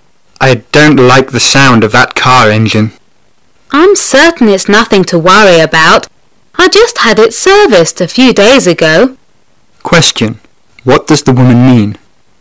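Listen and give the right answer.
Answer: The car is fine; it was just serviced.

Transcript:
[解析] Man: I don't like the sound of that car engine. Woman: I'm certain it's nothing to worry about. I just had it serviced a few days ago. Question: What does the woman mean?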